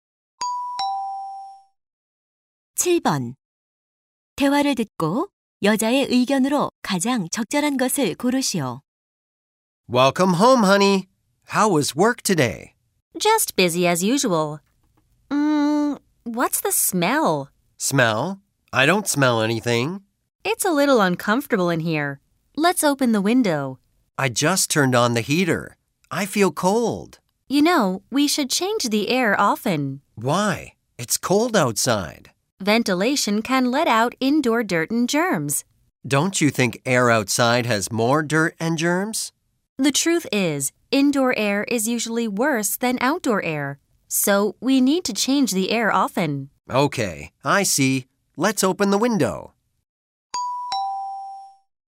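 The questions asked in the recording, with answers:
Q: 대화를 듣고 여자의 의견으로 가장 적절한 것을 고르시오.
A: 실내 공기를 자주 환기해야 한다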